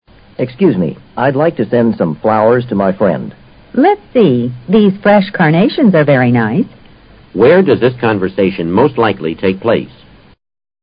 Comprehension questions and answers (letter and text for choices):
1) Where does this conversation mostly take place?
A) In a garden.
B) In the woods.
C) At a florist shop.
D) At a post office.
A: C) At a florist shop.

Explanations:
根据对话的内容可以判断,对话发生在服务性的行业里。A、B可以排除。在C、D之中邮局一般不办理卖花或送花的业务,只有florist shop (花店)经销花卉,并受顾客委托代客送花。